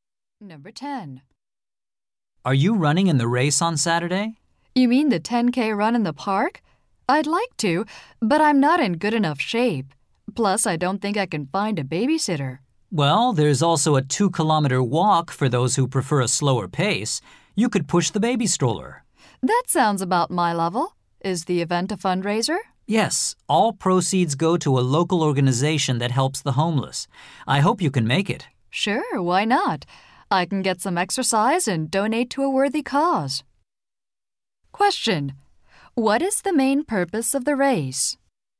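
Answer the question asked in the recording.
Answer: To raise money for a local organization that helps the homeless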